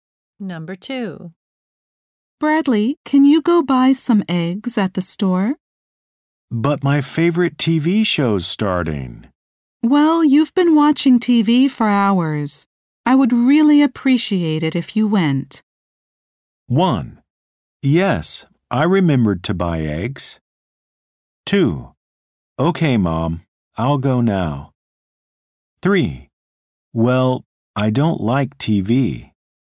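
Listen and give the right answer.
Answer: 2: Okay, Mom, I'll go now.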